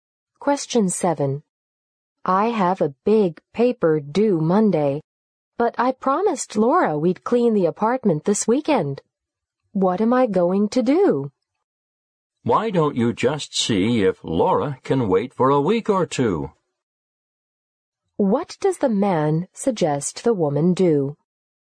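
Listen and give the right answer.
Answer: Ask Laura if the cleaning can wait a week or two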